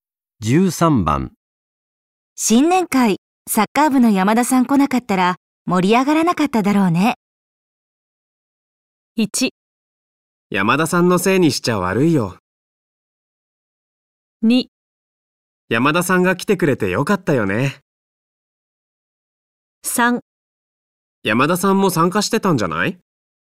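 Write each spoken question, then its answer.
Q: 新年会、サッカー部の山田さん来なかったら盛り上がらなかっただろうね。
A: 2: 山田さんが来てくれてよかったよね。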